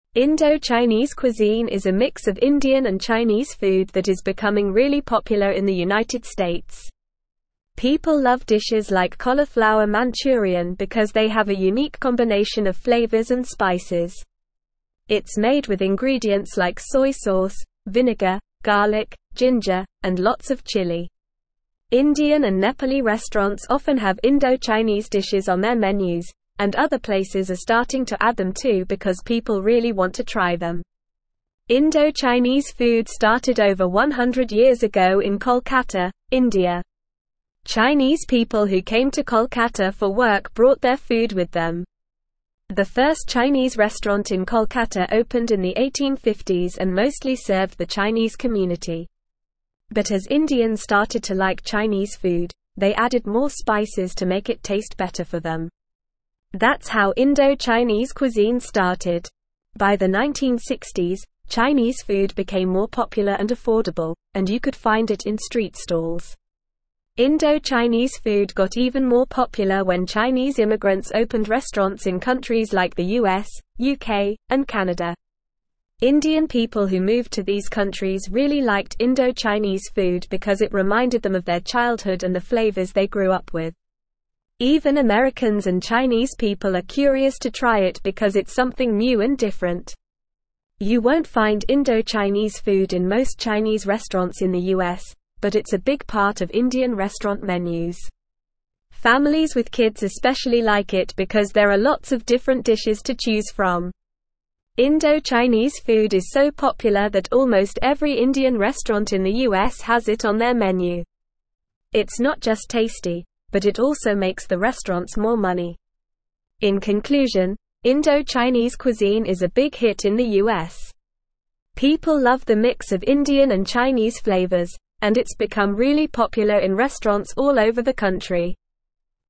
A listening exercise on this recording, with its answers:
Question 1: Indo-Chinese cuisine is a mix of Indian and Chinese food that is becoming really (1)______ in the United States.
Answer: popular

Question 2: People love dishes like cauliflower manchurian because they have a (2)______ combination of flavors and spices.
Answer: unique

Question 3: It's made with ingredients like soy sauce, (3)______, (4)______, ginger, and lots of chili.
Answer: vinegar

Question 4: It's made with ingredients like soy sauce, (3)______, (4)______, ginger, and lots of chili.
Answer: garlic

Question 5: Indo-(5)______ food started over 100 years ago in Kolkata, (6)______.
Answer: Chinese

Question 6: Indo-(5)______ food started over 100 years ago in Kolkata, (6)______.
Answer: India

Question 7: The first Chinese restaurant in Kolkata (7)______ in the 1850s and mostly (8)______ the Chinese community.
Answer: opened

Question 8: The first Chinese restaurant in Kolkata (7)______ in the 1850s and mostly (8)______ the Chinese community.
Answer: served

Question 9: Indian (9)______ who (10)______ to these countries really liked Indo-Chinese food because it reminded them of their (11)______ and the flavors they grew up with.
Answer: people

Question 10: Indian (9)______ who (10)______ to these countries really liked Indo-Chinese food because it reminded them of their (11)______ and the flavors they grew up with.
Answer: moved

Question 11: Indian (9)______ who (10)______ to these countries really liked Indo-Chinese food because it reminded them of their (11)______ and the flavors they grew up with.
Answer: childhood

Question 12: Even (12)______ and Chinese people are curious to try it because it's something new and different.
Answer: Americans

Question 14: Families with kids especially like it because there are lots of different (14)______ to choose from.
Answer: dishes

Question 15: In conclusion, Indo-Chinese (15)______ is a big hit in the US.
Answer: cuisine

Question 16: People love the mix of Indian and Chinese flavors, and it's become really popular in restaurants all over the (16)______.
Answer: country

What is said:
Indo-Chinese cuisine is a mix of Indian and Chinese food that is becoming really popular in the United States. People love dishes like cauliflower manchurian because they have a unique combination of flavors and spices. It's made with ingredients like soy sauce, vinegar, garlic, ginger, and lots of chili. Indian and Nepali restaurants often have Indo-Chinese dishes on their menus, and other places are starting to add them too because people really want to try them.
Indo-Chinese food started over 100 years ago in Kolkata, India. Chinese people who came to Kolkata for work brought their food with them. The first Chinese restaurant in Kolkata opened in the 1850s and mostly served the Chinese community. But as Indians started to like Chinese food, they added more spices to make it taste better for them. That's how Indo-Chinese cuisine started. By the 1960s, Chinese food became more popular and affordable, and you could find it in street stalls.
Indo-Chinese food got even more popular when Chinese immigrants opened restaurants in countries like the US, UK, and Canada. Indian people who moved to these countries really liked Indo-Chinese food because it reminded them of their childhood and the flavors they grew up with. Even Americans and Chinese people are curious to try it because it's something new and different.
You won't find Indo-Chinese food in most Chinese restaurants in the US, but it's a big part of Indian restaurant menus. Families with kids especially like it because there are lots of different dishes to choose from. Indo-Chinese food is so popular that almost every Indian restaurant in the US has it on their menu. It's not just tasty, but it also makes the restaurants more money.
In conclusion, Indo-Chinese cuisine is a big hit in the US. People love the mix of Indian and Chinese flavors, and it's become really popular in restaurants all over the country.

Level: Level 3